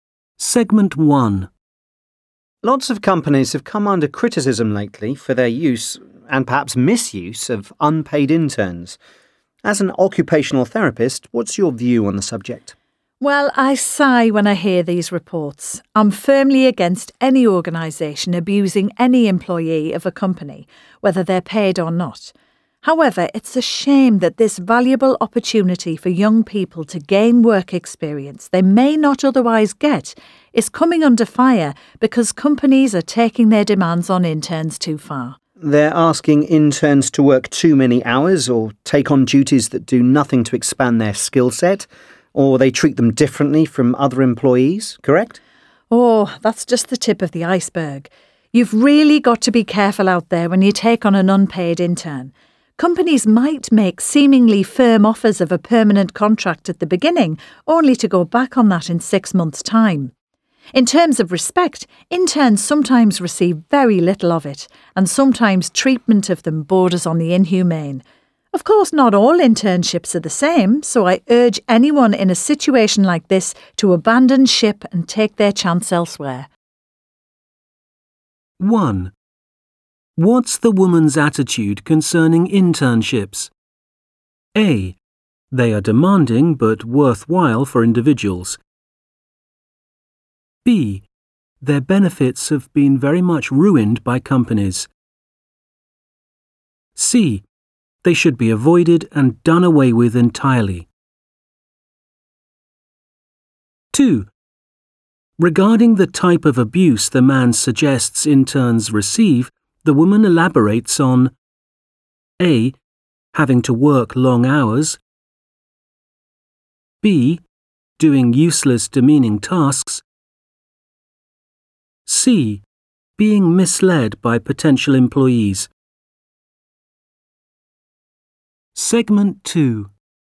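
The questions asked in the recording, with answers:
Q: What's the woman's attitude concerning internships?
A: B: Their benefits have been very much ruined by companies.

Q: Regarding the type of abuse the man suggests interns receive, the woman elaborates on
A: C: Being misled by potential employees.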